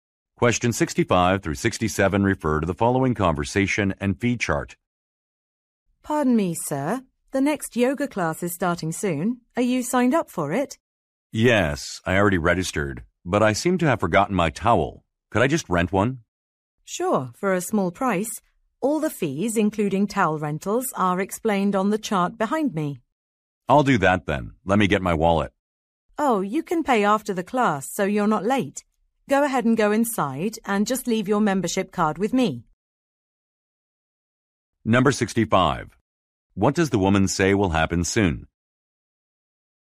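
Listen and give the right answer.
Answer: A yoga class will start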